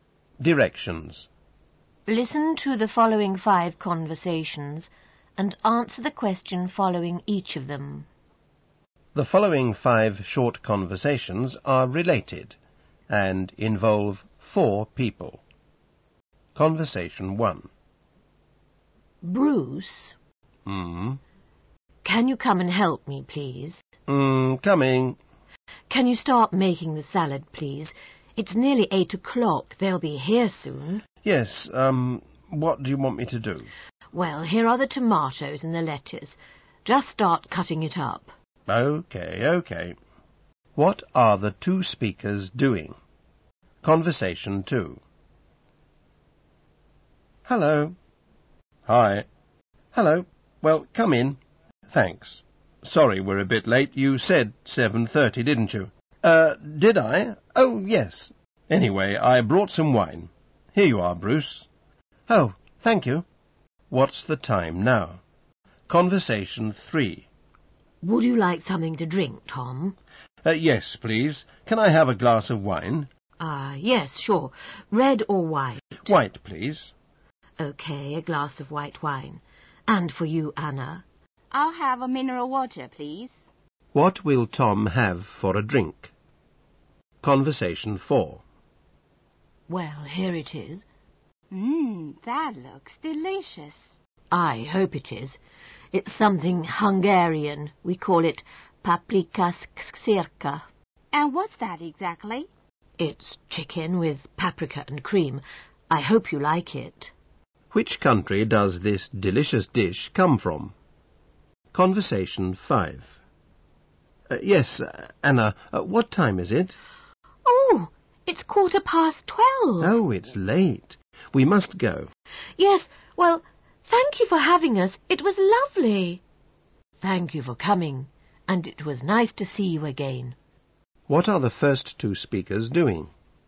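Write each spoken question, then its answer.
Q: What are the 2 speakers doing?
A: Making a salad

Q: What will Tom have for a drink?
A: A glass of white wine

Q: Which country does this delicious dish come from?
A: Hungary

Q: What are the first 2 speakers doing?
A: Leaving the party, thanking the host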